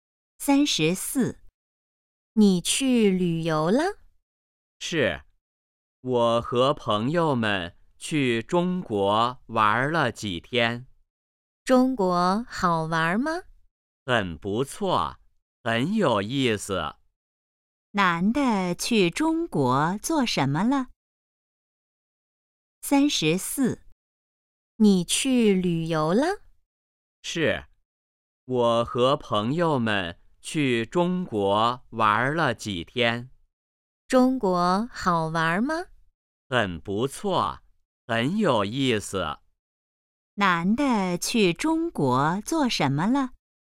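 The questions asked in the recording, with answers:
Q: 男的去中国做什么了?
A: 旅游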